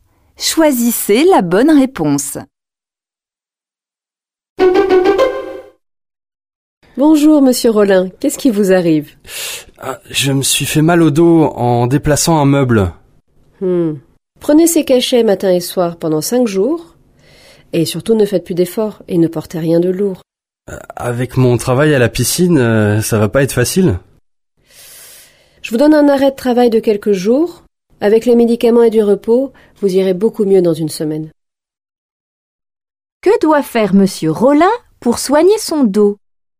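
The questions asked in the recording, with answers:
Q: Que doit faire Monsieur Rollin pour soigner son dos?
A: Prendre des cachets matin et soir pendant 5 jours et se reposer (ne rien porter de lourd).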